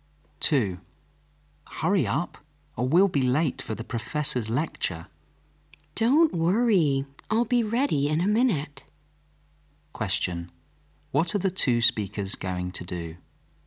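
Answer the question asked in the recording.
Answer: Attend the professor's lecture.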